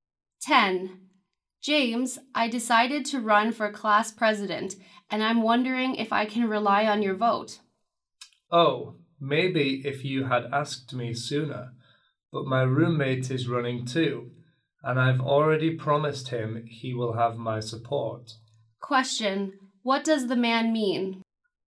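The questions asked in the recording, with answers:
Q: Question, what does the man mean?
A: He will vote for his roommate, not her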